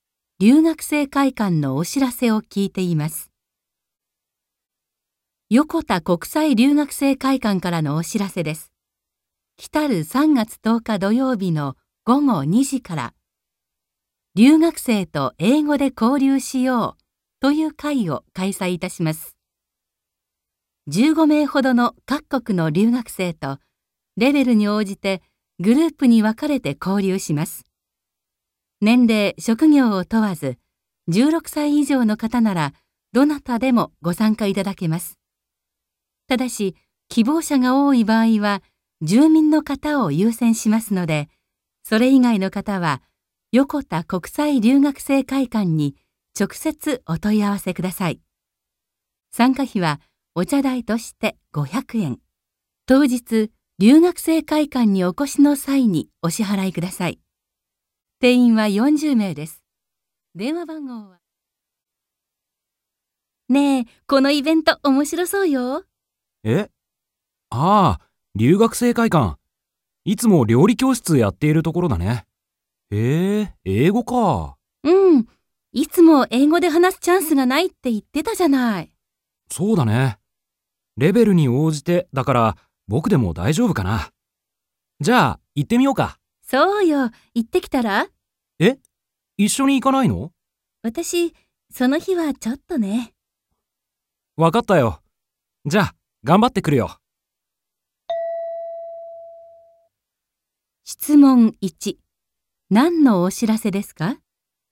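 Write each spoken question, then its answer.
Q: 何のお知らせですか?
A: 留学生と英語で交流する会のお知らせ

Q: 二人はこの後どうしますか?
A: 男の人だけが交流会に参加する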